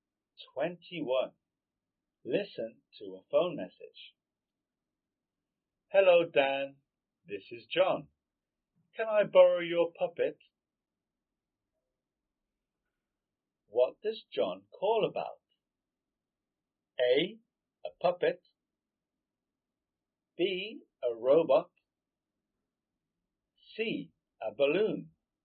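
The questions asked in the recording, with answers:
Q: What does John call about?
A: A: A puppet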